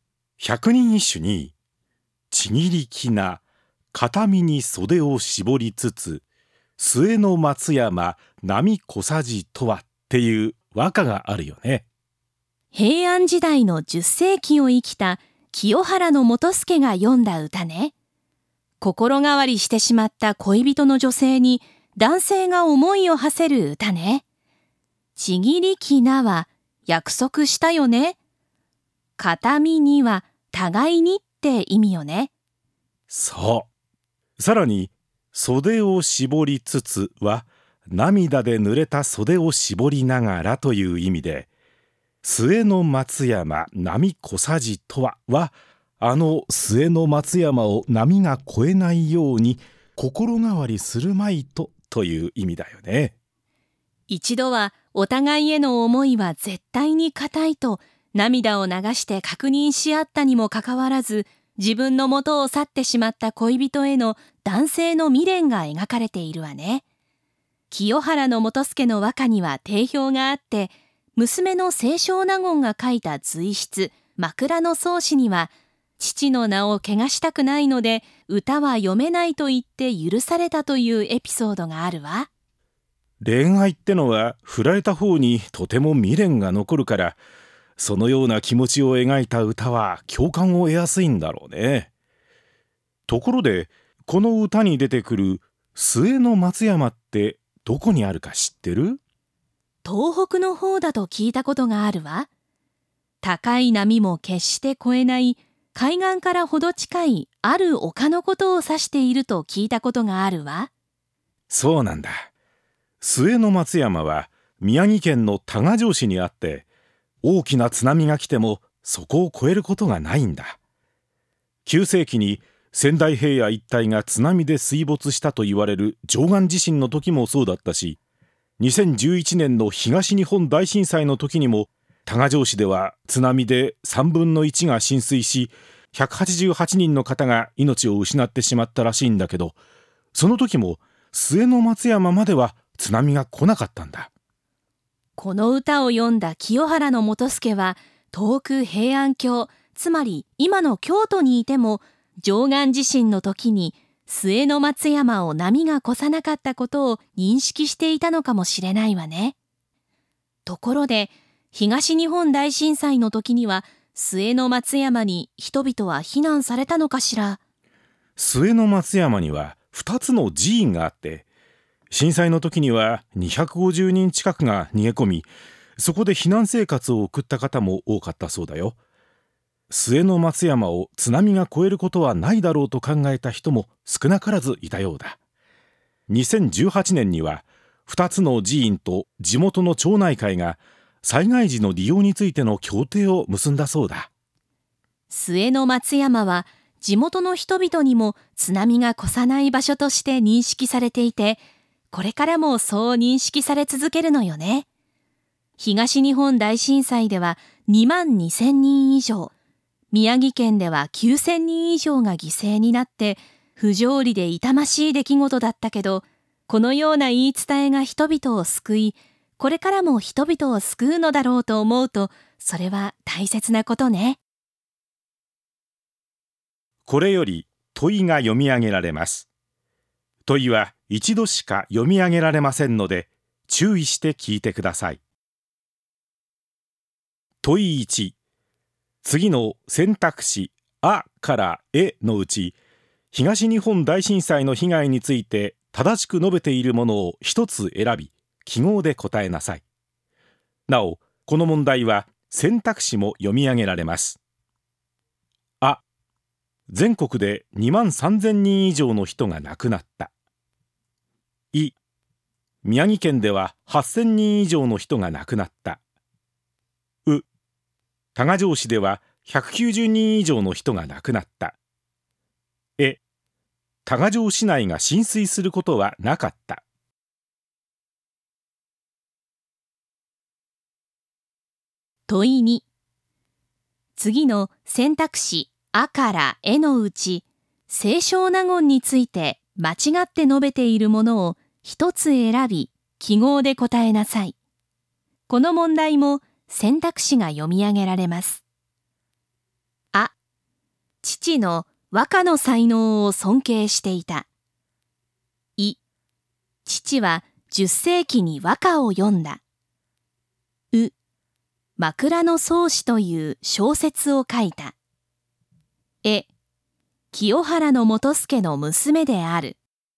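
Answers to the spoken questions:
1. い: 宮城県では8,000人以上の人が亡くなった。
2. う: 枕草子という小説を書いた。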